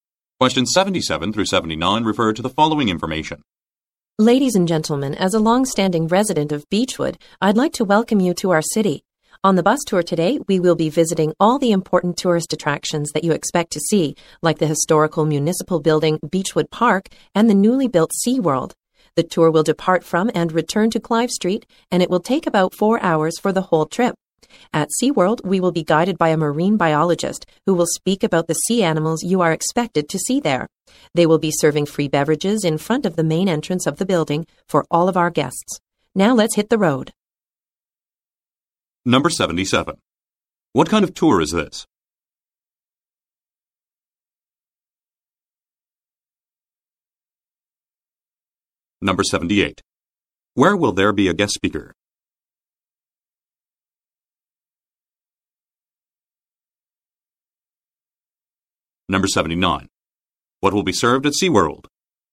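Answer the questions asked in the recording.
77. A bus tour of the city
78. At SeaWorld
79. Free beverages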